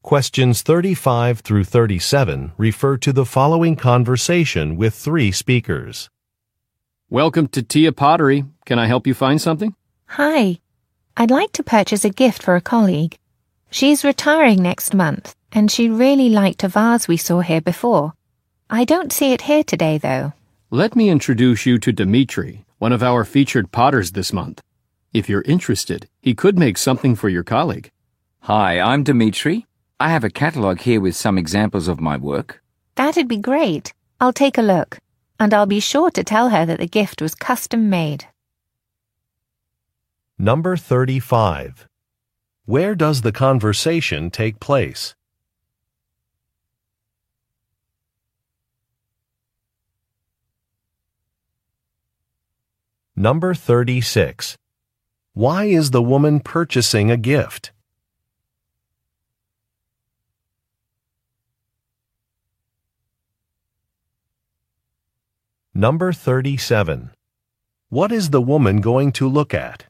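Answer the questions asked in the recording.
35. At a pottery store
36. Her colleague is retiring
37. A catalog of Dimitri's work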